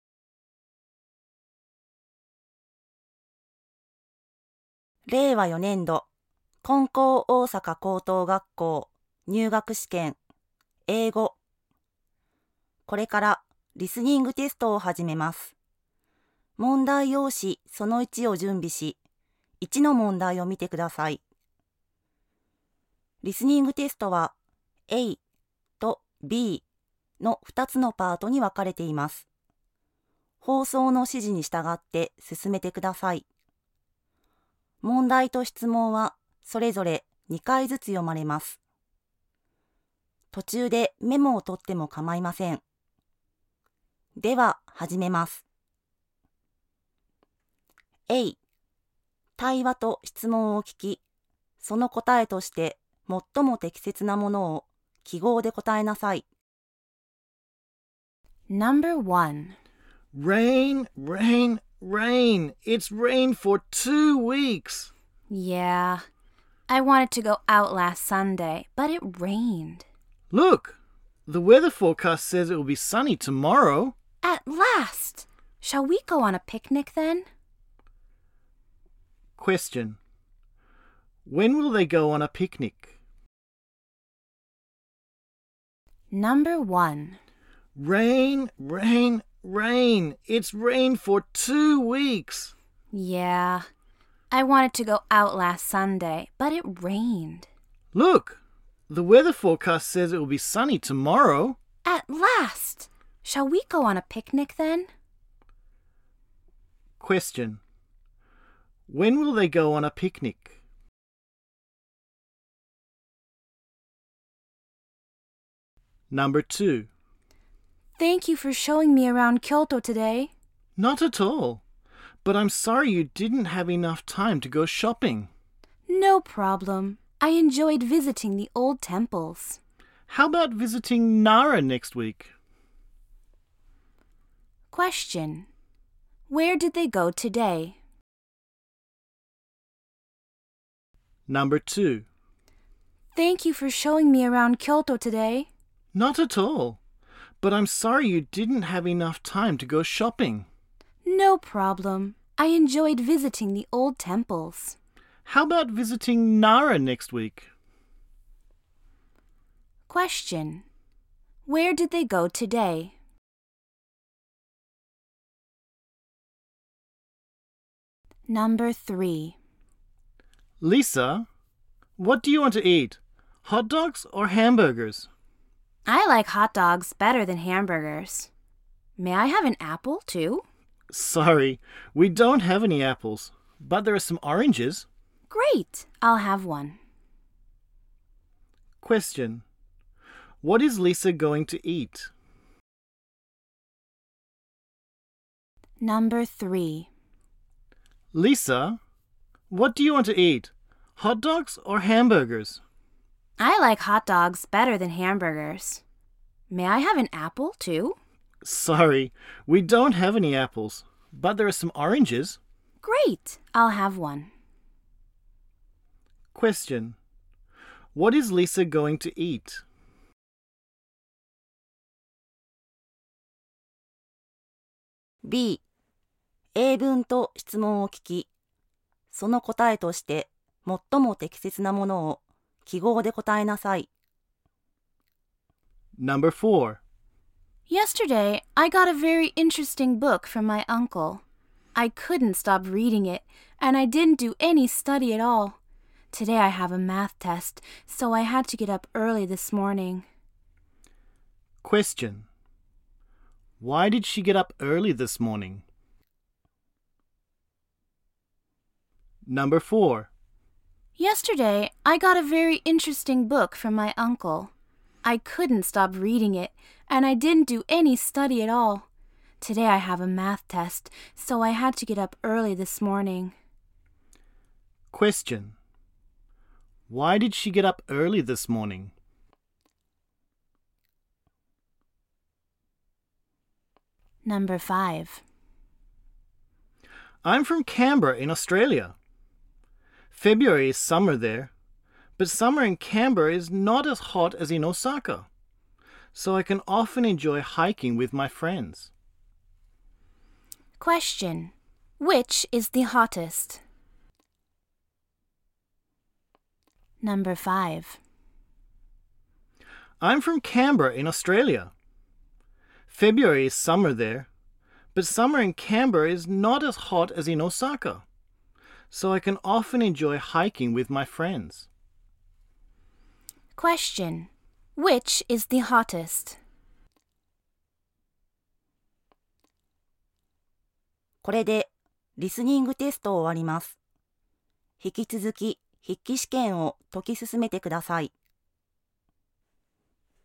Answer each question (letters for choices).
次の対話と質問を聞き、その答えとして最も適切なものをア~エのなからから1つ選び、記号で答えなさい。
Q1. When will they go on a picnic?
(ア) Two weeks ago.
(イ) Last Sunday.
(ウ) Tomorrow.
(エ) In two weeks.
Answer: ウ

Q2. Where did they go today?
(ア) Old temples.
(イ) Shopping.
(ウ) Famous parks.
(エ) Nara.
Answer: ア

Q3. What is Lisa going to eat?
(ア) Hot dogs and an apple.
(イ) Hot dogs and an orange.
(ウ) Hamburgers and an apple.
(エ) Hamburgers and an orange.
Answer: イ

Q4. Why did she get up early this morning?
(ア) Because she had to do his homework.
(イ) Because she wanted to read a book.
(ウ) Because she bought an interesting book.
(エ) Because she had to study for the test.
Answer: エ

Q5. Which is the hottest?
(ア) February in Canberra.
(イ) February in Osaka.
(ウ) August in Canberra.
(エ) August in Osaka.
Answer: エ

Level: 高校